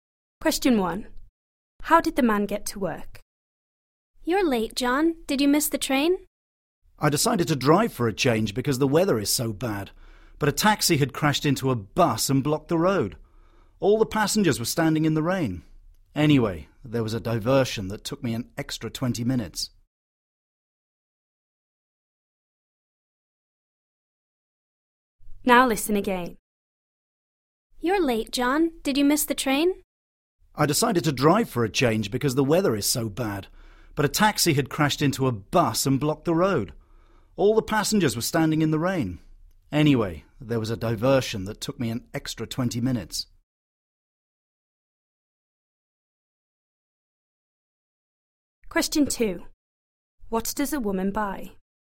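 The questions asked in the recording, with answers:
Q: How did the man get to work?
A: He drove (by car)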